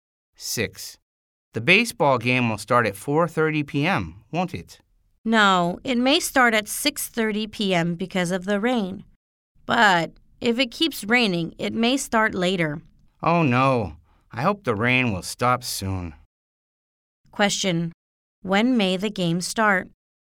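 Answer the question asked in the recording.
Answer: At 6:30 p.m., or later if it keeps raining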